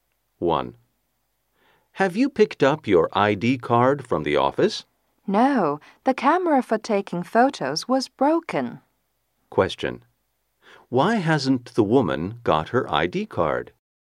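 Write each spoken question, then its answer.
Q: Why hasn't the woman got her ID card?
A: The camera for taking photos was broken.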